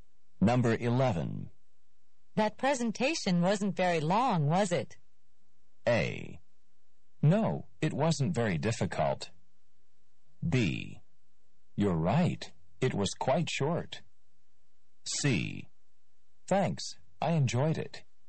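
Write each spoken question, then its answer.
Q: That presentation wasn't very long, was it?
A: B: You're right. It was quite short.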